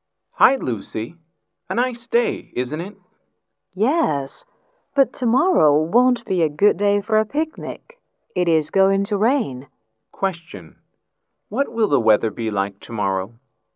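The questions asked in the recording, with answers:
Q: What will the weather be like tomorrow?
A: Rainy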